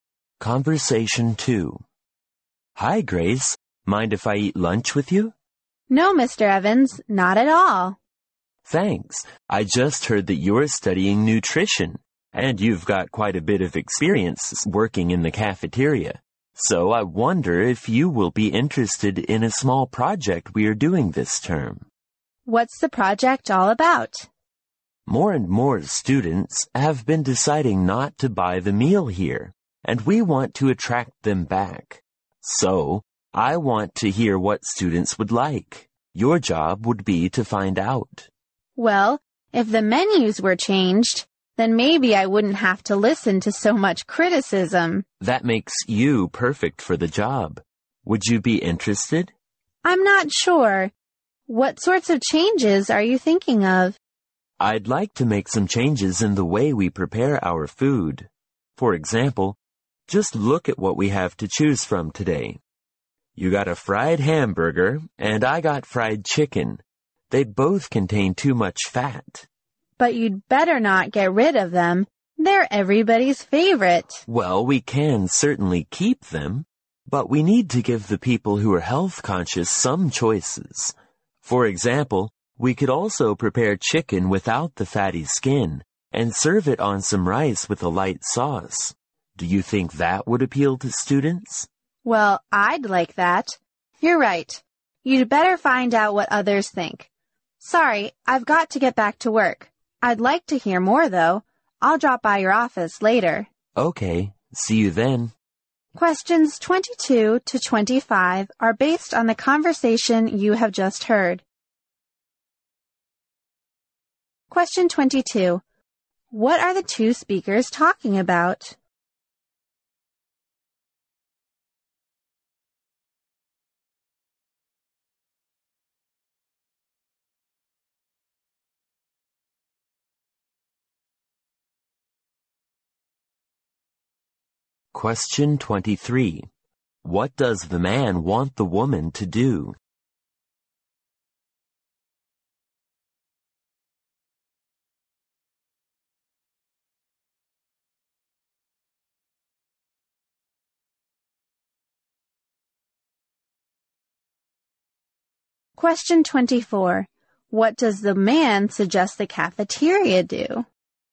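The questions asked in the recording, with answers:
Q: What are the two speakers talking about?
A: A project to improve the cafeteria food and bring students back

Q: What does the man want the woman to do?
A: Find out what food students would like

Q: What does the man suggest the cafeteria do?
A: Offer healthier, low-fat choices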